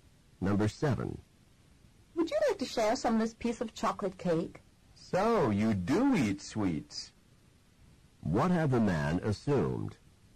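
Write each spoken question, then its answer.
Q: What had the man assumed?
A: That the woman did not eat sweets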